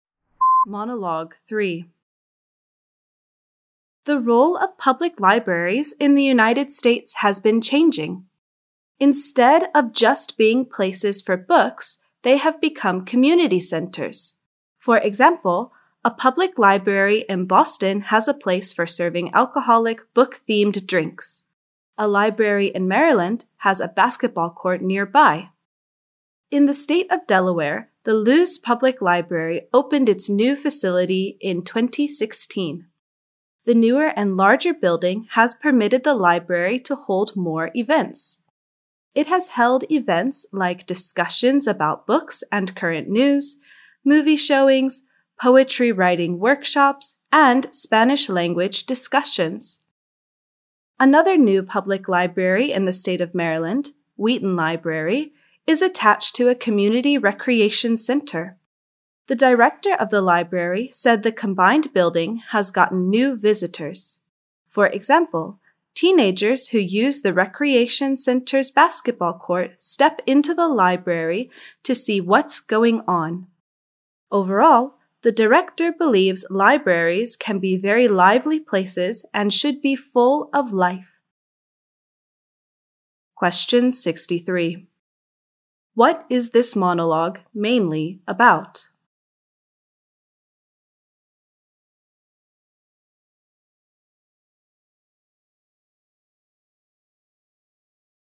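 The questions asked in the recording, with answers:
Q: What is this monologue mainly about?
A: The changing role of public libraries in the US as community centers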